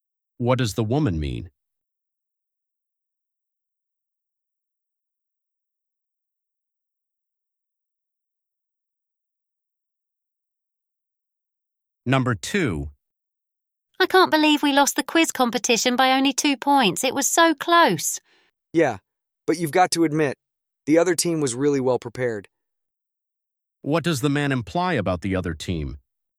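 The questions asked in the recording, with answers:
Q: What does the man imply about the other team?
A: They deserved to win because they were well prepared.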